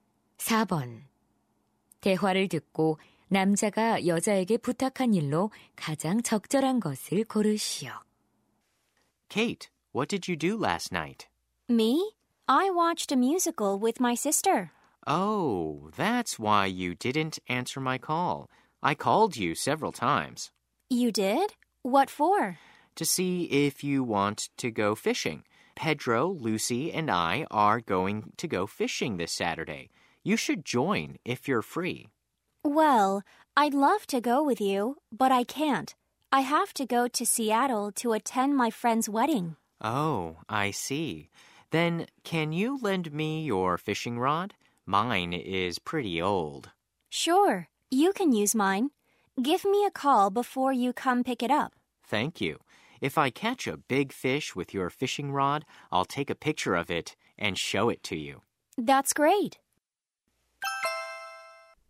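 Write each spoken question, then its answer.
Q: 대화를 듣고 남자가 여자에게 부탁한 일로 가장 적절한 것을 고르시오.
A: 낚싯대 빌려주기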